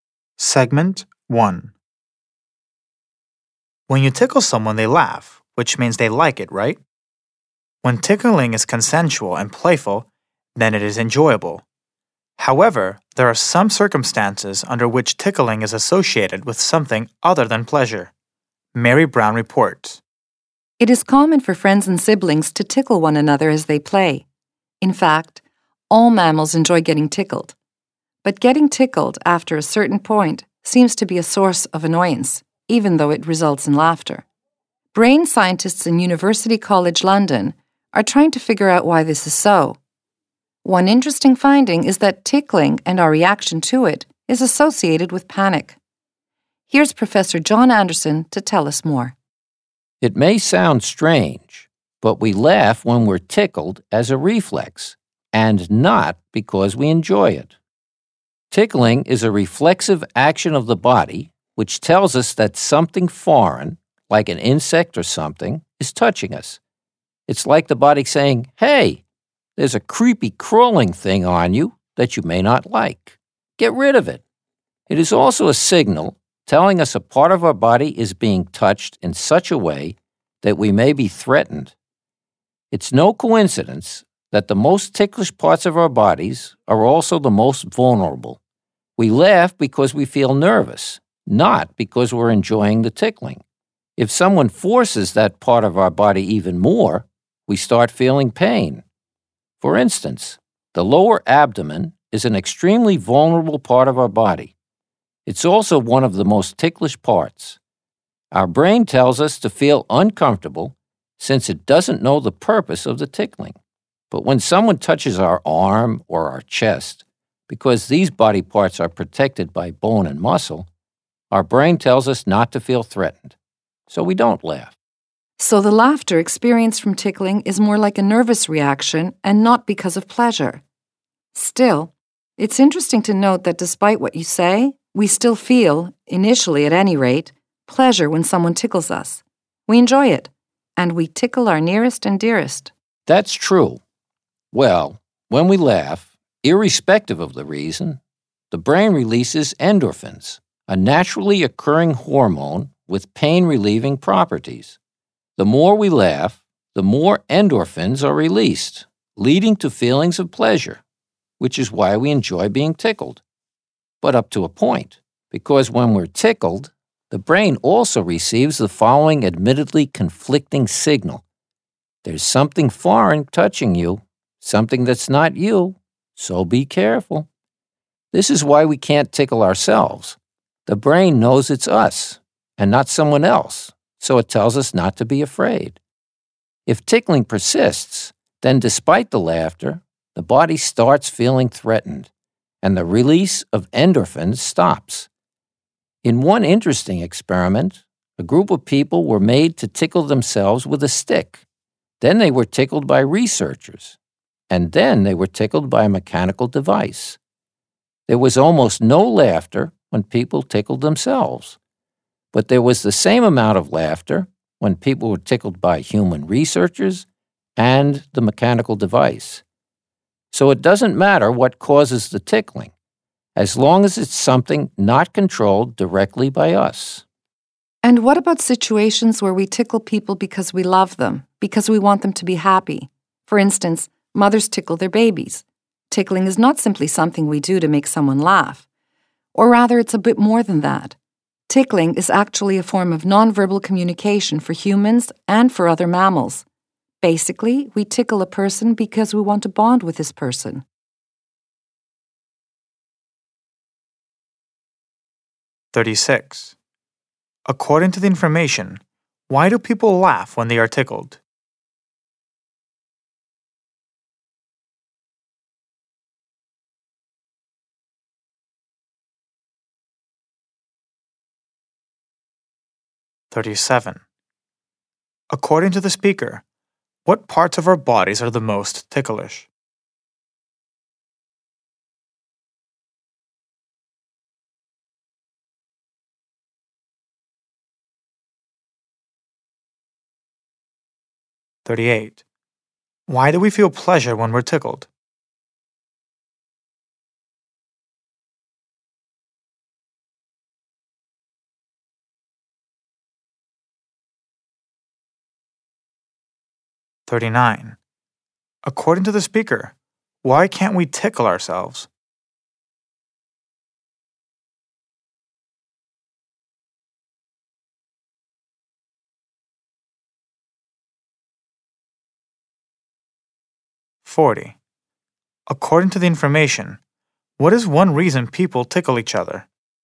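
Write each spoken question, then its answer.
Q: According to the information, why do people laugh when they are tickled?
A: As a nervous reflex, not because they enjoy it

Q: According to the speaker, what parts of our bodies are the most ticklish?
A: The most vulnerable parts, like the lower abdomen

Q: Why do we feel pleasure when we're tickled?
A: Laughing makes the brain release endorphins

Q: According to the speaker, why can't we tickle ourselves?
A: The brain knows it's us, so it tells us not to be afraid

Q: According to the information, what is one reason people tickle each other?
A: To bond with the person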